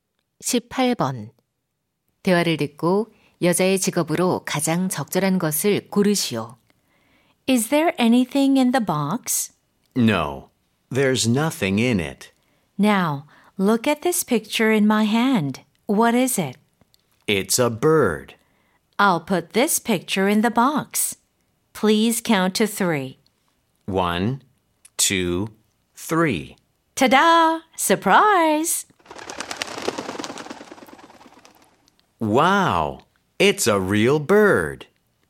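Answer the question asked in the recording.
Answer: 마술사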